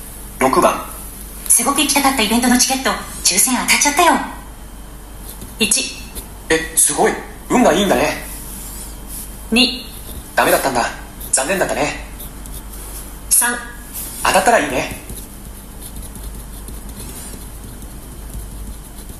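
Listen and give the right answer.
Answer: 1: え、すごい、運がいいんだね。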